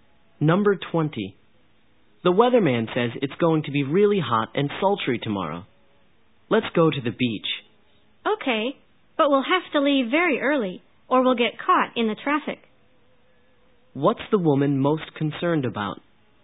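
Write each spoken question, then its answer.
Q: What's the woman most concerned about?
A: Getting caught in traffic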